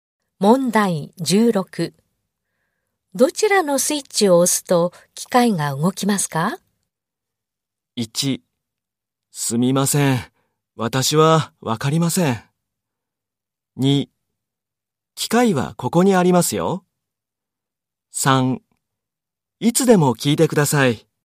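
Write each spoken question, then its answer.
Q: どちらのスイッチを押すと機械が動きますか?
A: 1: すみません。私はわかりません。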